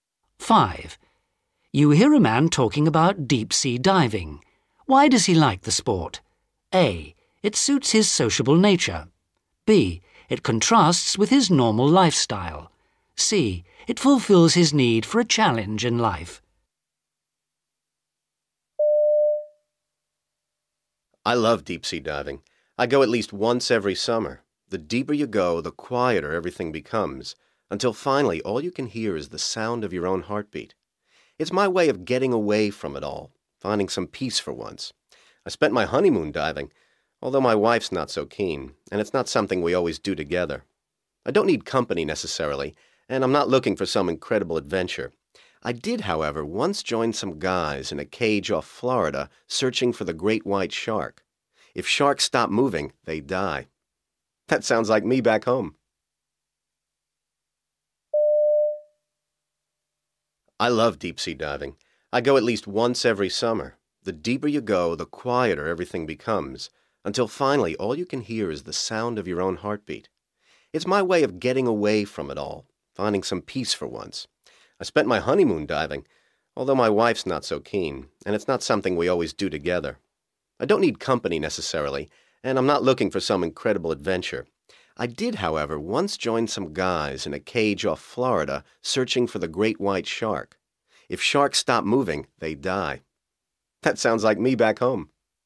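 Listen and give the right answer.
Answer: B: It contrasts with his normal lifestyle.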